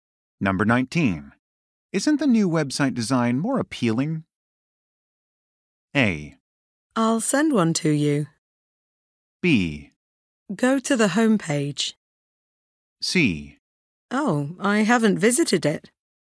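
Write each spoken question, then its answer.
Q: Isn't the new website design more appealing?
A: C: Oh, I haven't visited it.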